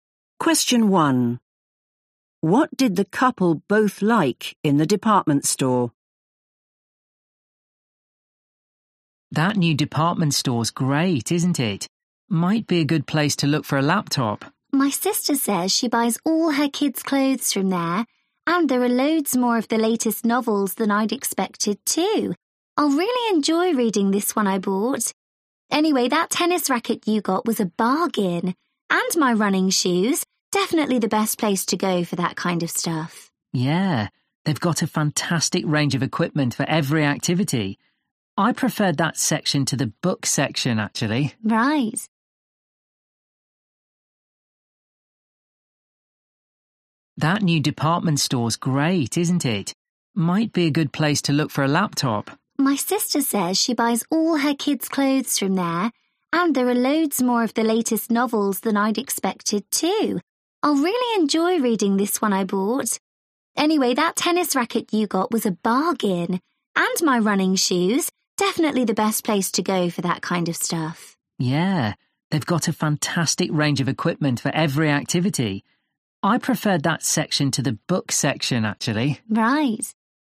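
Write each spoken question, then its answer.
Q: What did the couple both like in the department store?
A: the sports equipment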